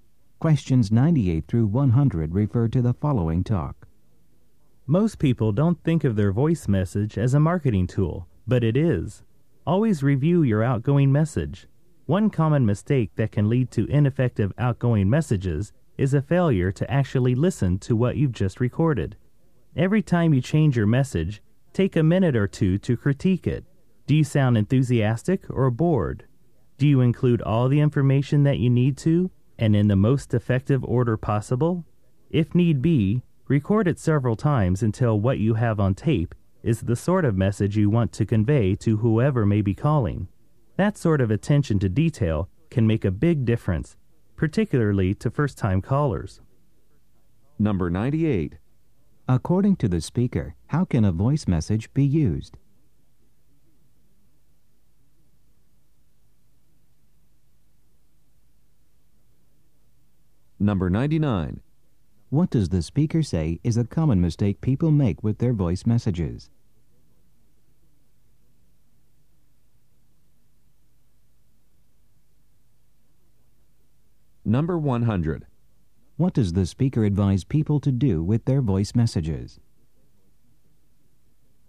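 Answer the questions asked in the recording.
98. As a marketing tool
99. Not listening to what they recorded
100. Review and critique them, re-recording if needed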